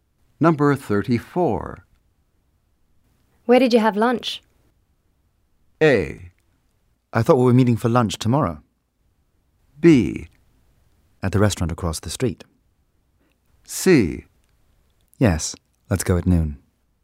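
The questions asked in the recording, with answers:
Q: Where did you have lunch?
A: B: At the restaurant across the street.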